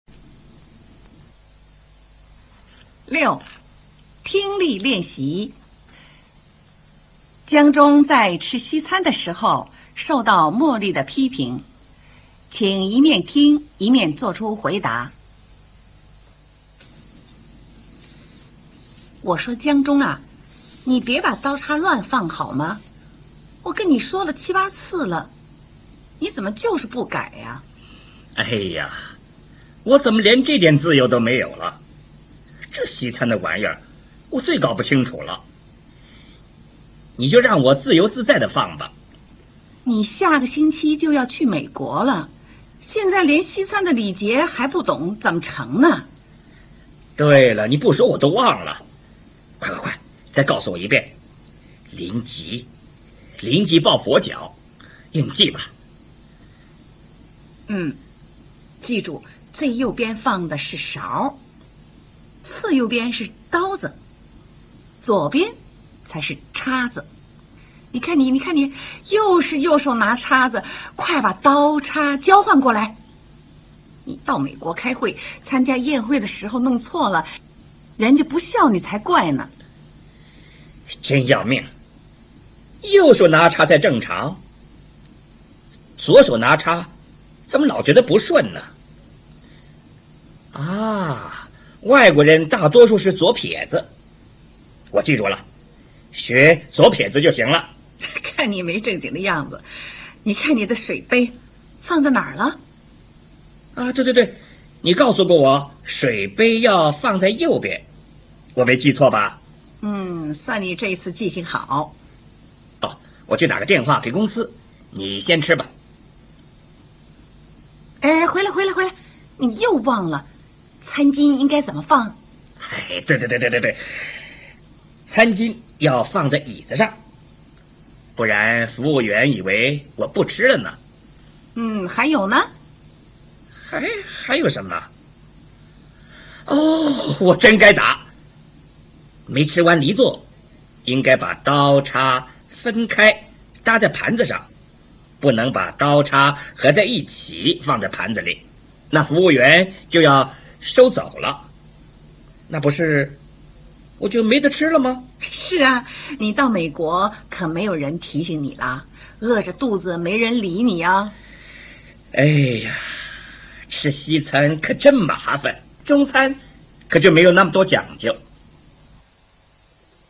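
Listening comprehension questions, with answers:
江忠在吃西餐的時候受到莫莉的批評,請一面聽一面做出回答。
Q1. 莫莉說江忠什麼事情說了七、八次?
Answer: 別把刀叉亂放

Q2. 江忠就要到美國開會了,莫莉提醒他什麼?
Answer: 要懂西餐的禮節

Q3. 餐刀放在 __________ 邊,餐叉放在 __________ 邊。 右手拿 __________,左手拿 __________ 。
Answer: 右;左;刀子;叉子

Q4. 江忠說怎麼記才能記住如何拿刀叉?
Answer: 學左撇子

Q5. 江忠唯一記住的西餐禮節是什麼?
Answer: 水杯要放在右邊

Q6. 江忠離座時把餐巾、刀叉放錯了,為什 麼?請說明。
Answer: 餐巾要放在椅子上,刀叉要分開搭在盤子上;否則服務員以為他不吃了,會收走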